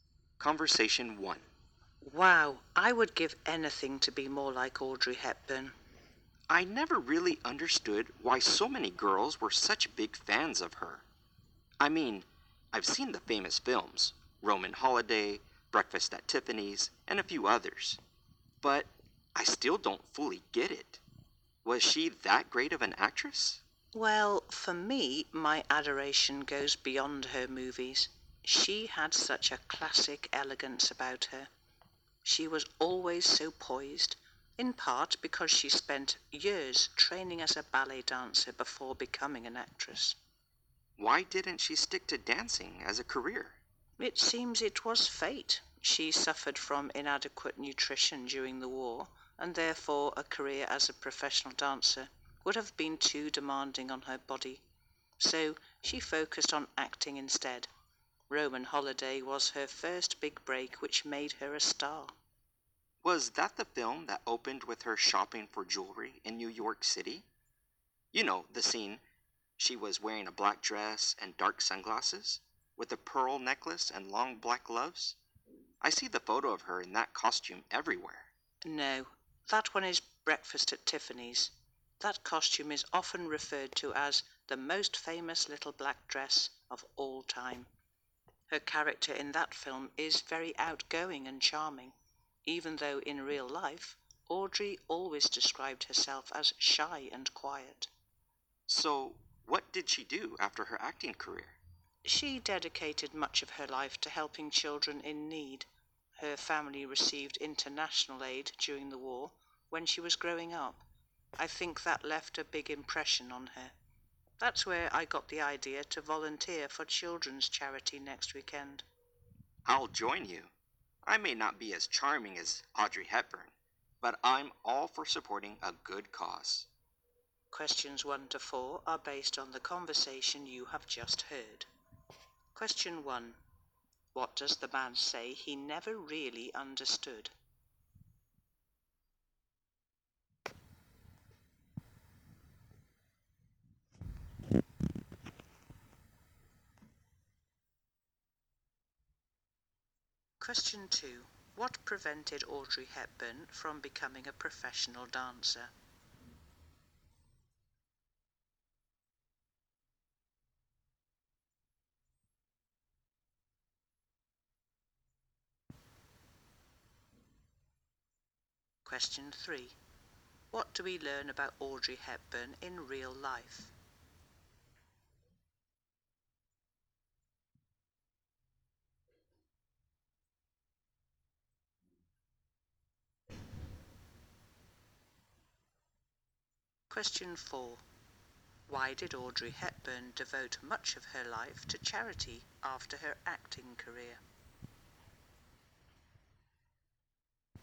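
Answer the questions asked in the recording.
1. Why so many girls were such big fans of Audrey Hepburn
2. Her body was weakened by poor nutrition during the war
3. She described herself as shy and quiet
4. Her family got international aid during the war when she was growing up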